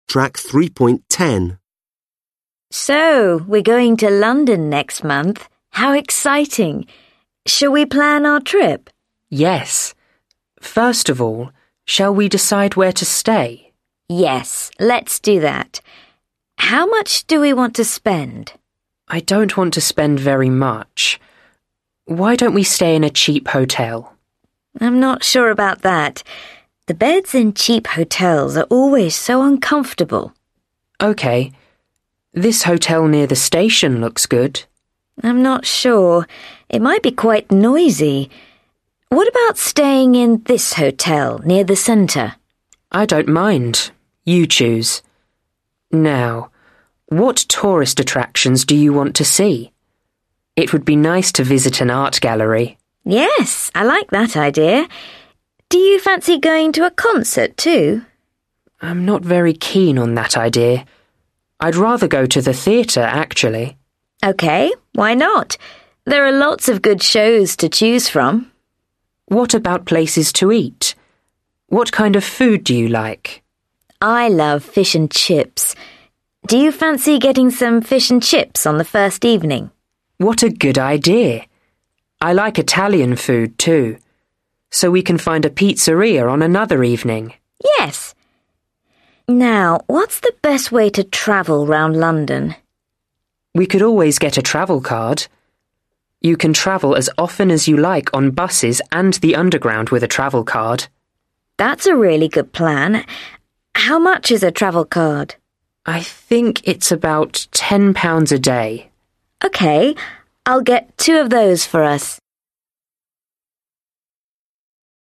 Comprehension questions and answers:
Read the task below. Then listen to a candidate doing the task. Which attractions from exercise 2 do they mention?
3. Which attractions from exercise 2 do they mention?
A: art gallery, concert, theatre

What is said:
Examiner: So, we're going to London next month. How exciting! Shall we plan our trip?
Candidate: Yes, first of all, shall we decide where to stay?
Examiner: Yes, let's do that. How much do we want to spend?
Candidate: I don't want to spend very much. Why don't we stay in a cheap hotel?
Examiner: I'm not sure about that. The beds in cheap hotels are always so uncomfortable!
Candidate: OK. This hotel near the station looks good.
Examiner: I'm not sure. It might be quite noisy. What about staying in this hotel, near the centre?
Candidate: I don't mind. You choose. Now, what tourist attractions do you want to see? It would be nice to visit an art gallery.
Examiner: Yes, I like that idea. Do you fancy going to a concert, too?
Candidate: I'm not very keen on that idea. I'd rather go to the theatre, actually.
Examiner: OK. Why not? There are lots of good shows to choose from.
Candidate: What about places to eat? What kind of food do you like?
Examiner: I love fish and chips. Do you fancy getting some fish and chips on the first evening?
Candidate: What a good idea! I like Italian food, too, so we can find a pizzeria on another evening.
Examiner: Yes. Now, what's the best way to travel round London?
Candidate: We could always get a Travelcard. You can travel as often as you like on buses and the underground with a Travelcard.
Examiner: That's a really good plan. How much is a Travelcard?
Candidate: I think it's about £10 a day.
Examiner: OK, I'll get two of those for us.

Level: Lớp 10